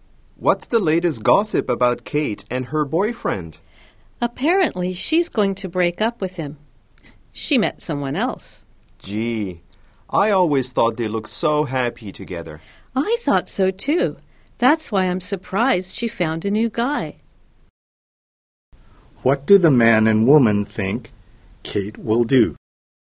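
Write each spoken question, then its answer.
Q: What do the man and woman think Kate will do?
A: Break up with her boyfriend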